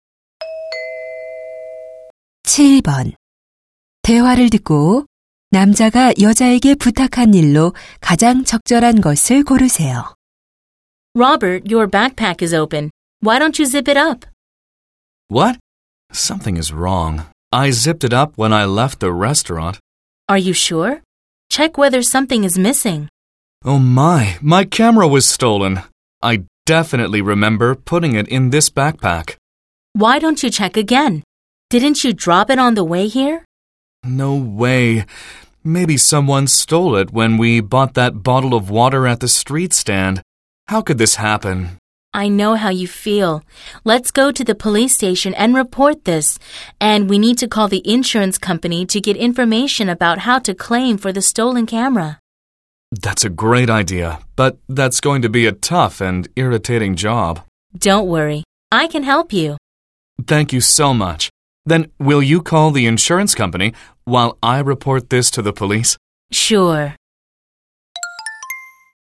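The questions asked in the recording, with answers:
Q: 대화를 듣고 남자가 여자에게 부탁한 일로 가장 적절한 것을 고르세요.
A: 보험 회사에 전화하기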